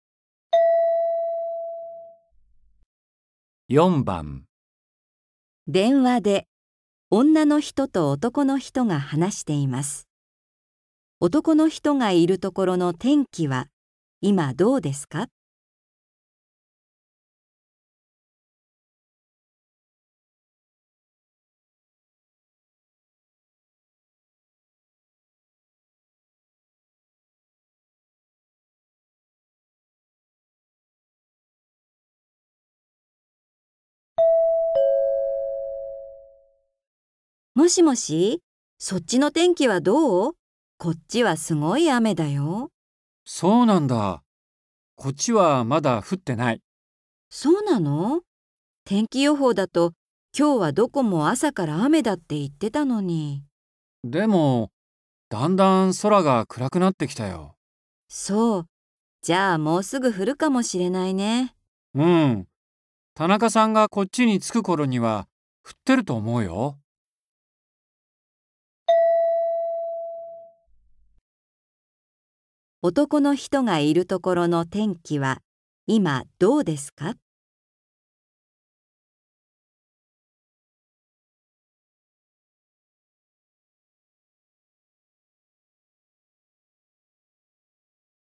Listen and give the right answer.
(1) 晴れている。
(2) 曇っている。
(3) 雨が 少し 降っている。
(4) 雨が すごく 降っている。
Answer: (2) 曇っている。

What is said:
F:もしもし、そっちの天気はどう?こっちはすごい雨だよ。
M:そうなんだ。こっちはまだ降ってない。
M:でも、だんだん空が暗くなってきたよ。
F:そう。じゃあ、もうすぐ降るかもしれないね。
M:うん。田中さんがこっちに着くところには降ってると思うよ。
男の人がいるところの天気は、今どうですか。

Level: 初級